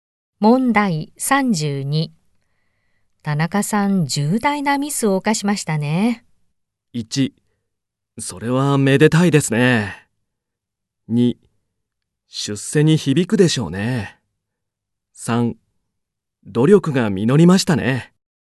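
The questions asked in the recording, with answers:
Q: 田中さん、重大なミスを犯しましたね。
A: 2: 出世に響くでしょうね。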